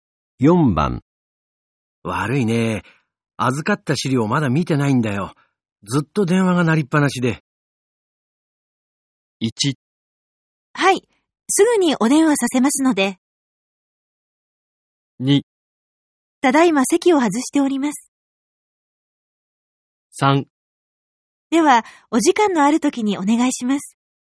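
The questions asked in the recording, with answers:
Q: 悪いね。預かった資料まだ見てないんだよ。ずっと電話が鳴りっぱなしで。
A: 3: では、お時間のある時にお願いします。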